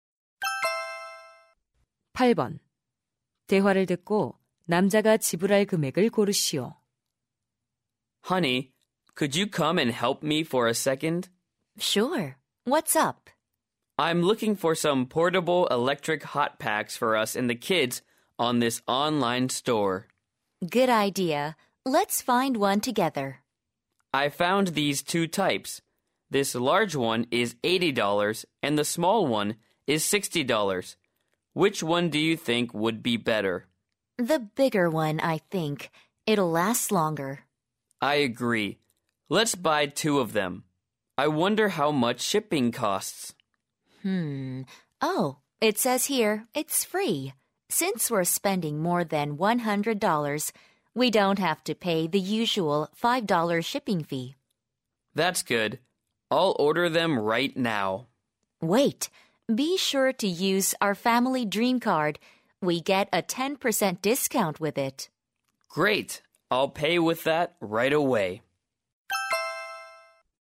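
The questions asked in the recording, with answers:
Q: 대화를 듣고 남자가 지불할 금액을 고르시오.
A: $144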